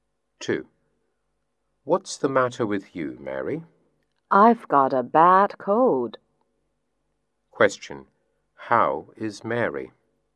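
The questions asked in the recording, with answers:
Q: How is Mary?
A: She has got a bad cold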